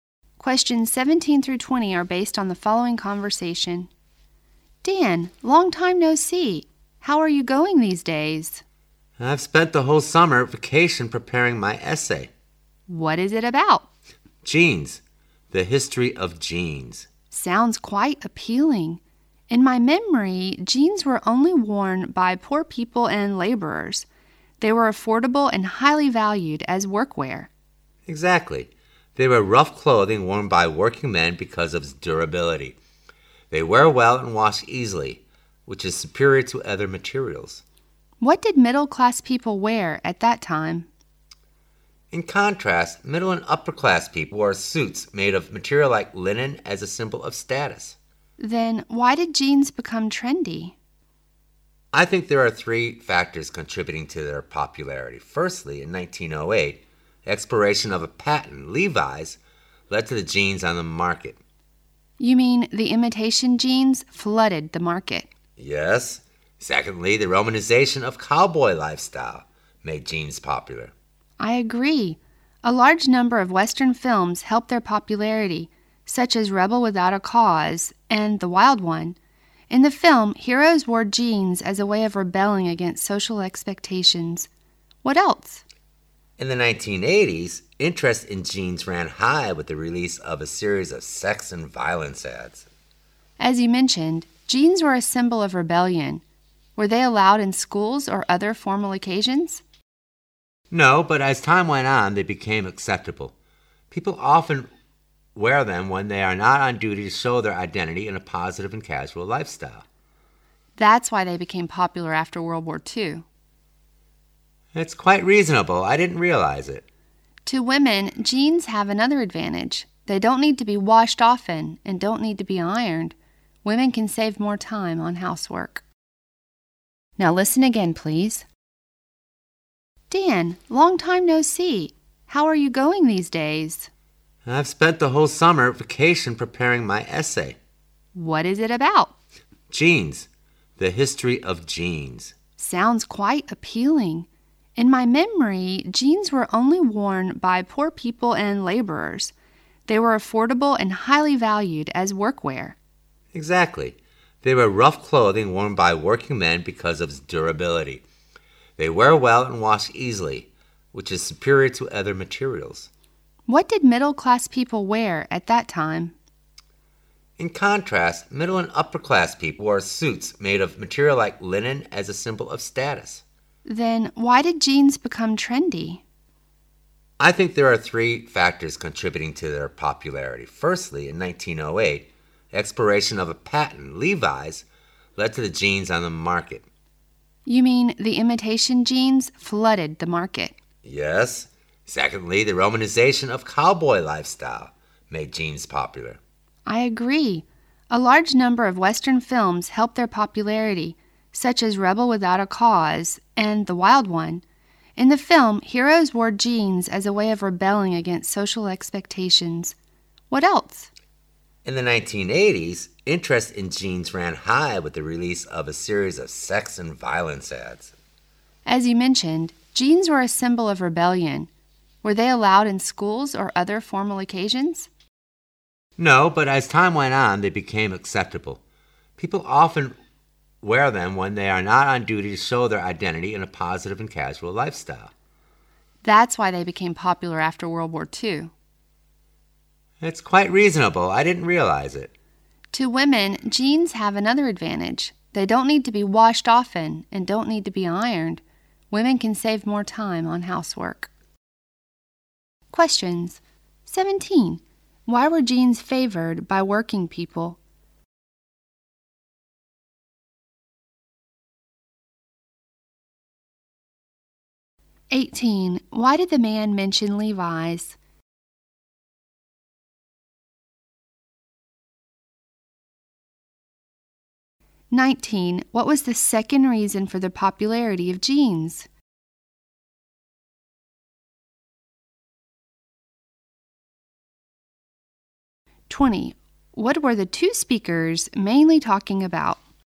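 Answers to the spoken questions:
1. They were durable, affordable and easy to wash
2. When Levi's patent expired in 1908, imitation jeans flooded the market
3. The romanticization of the cowboy lifestyle
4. The history of jeans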